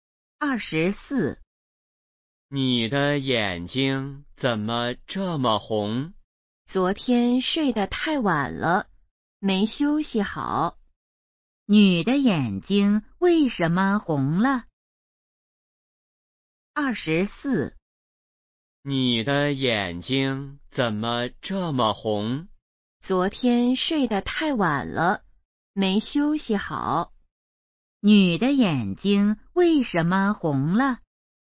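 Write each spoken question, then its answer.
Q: 女的眼睛为什么红了?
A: 昨天睡得太晚了,没休息好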